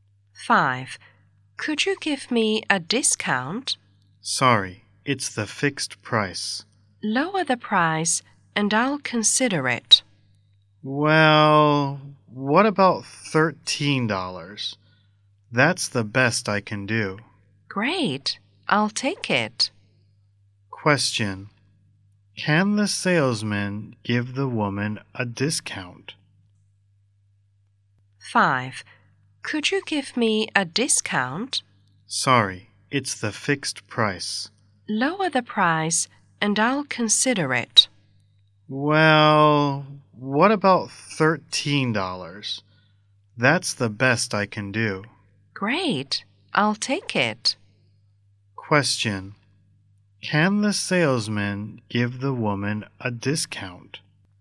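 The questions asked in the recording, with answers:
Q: Can the salesman give the woman a discount?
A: Yes, he lowers the price to $13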